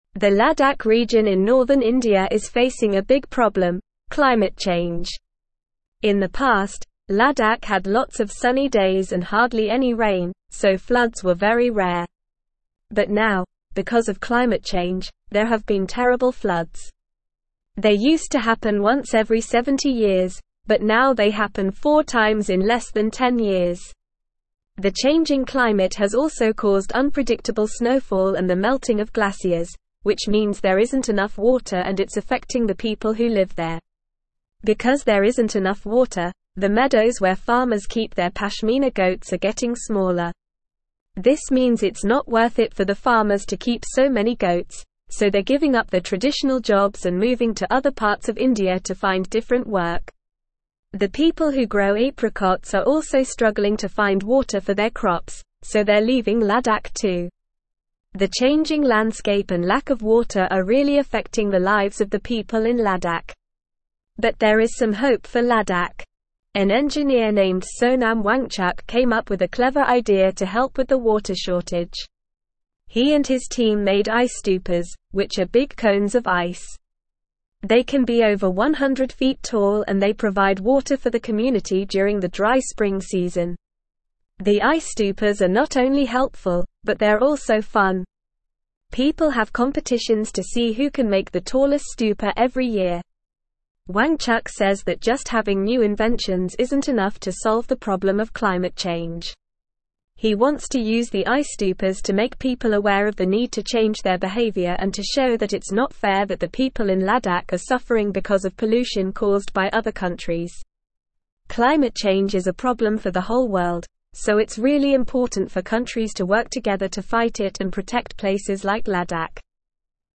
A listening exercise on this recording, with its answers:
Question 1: The Ladakh region in northern India is facing a big problem: (1)______ change.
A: climate

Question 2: They used to happen once every 70 years, but now they happen four (2)______ in less than 10 years.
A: times

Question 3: The (3)______ climate has also caused unpredictable (4)______ and the melting of glaciers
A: changing

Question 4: The (3)______ climate has also caused unpredictable (4)______ and the melting of glaciers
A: snowfall

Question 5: Because there isn't enough water, the meadows where (5)______ keep their pashmina goats are (6)______ smaller.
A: farmers

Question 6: Because there isn't enough water, the meadows where (5)______ keep their pashmina goats are (6)______ smaller.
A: getting

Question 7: so they're giving up their traditional jobs and moving to (7)______ parts of India to find different work.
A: other

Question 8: The people who grow apricots are also (8)______ to find water for their crops, so they're leaving Ladakh too.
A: struggling

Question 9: An engineer (9)______ Sonam (10)______ came up with a clever idea to help with the water shortage.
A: named

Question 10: An engineer (9)______ Sonam (10)______ came up with a clever idea to help with the water shortage.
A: Wangchuk

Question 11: He and his team made ice (11)______, which are big cones of ice.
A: stupas

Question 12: They can be over 100 feet tall and they provide water for the (12)______ during the dry spring season.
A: community

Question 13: Wangchuk says that just (13)______ new inventions isn't enough to solve the problem of climate change.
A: having

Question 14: He wants to use the ice stupas to make (14)______ aware of the need to change their behavior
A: people

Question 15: it's not fair that the people in (15)______ are suffering because of pollution caused by other countries.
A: Ladakh

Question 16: so it's really important for countries to work together to fight it and protect (16)______ like Ladakh.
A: places

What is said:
The Ladakh region in northern India is facing a big problem: climate change. In the past, Ladakh had lots of sunny days and hardly any rain, so floods were very rare. But now, because of climate change, there have been terrible floods. They used to happen once every 70 years, but now they happen four times in less than 10 years. The changing climate has also caused unpredictable snowfall and the melting of glaciers, which means there isn't enough water and it's affecting the people who live there.
Because there isn't enough water, the meadows where farmers keep their pashmina goats are getting smaller. This means it's not worth it for the farmers to keep so many goats, so they're giving up their traditional jobs and moving to other parts of India to find different work. The people who grow apricots are also struggling to find water for their crops, so they're leaving Ladakh too. The changing landscape and lack of water are really affecting the lives of the people in Ladakh.
But there is some hope for Ladakh. An engineer named Sonam Wangchuk came up with a clever idea to help with the water shortage. He and his team made ice stupas, which are big cones of ice. They can be over 100 feet tall and they provide water for the community during the dry spring season. The ice stupas are not only helpful, but they're also fun. People have competitions to see who can make the tallest stupa every year.
Wangchuk says that just having new inventions isn't enough to solve the problem of climate change. He wants to use the ice stupas to make people aware of the need to change their behavior and to show that it's not fair that the people in Ladakh are suffering because of pollution caused by other countries. Climate change is a problem for the whole world, so it's really important for countries to work together to fight it and protect places like Ladakh.

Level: Level 3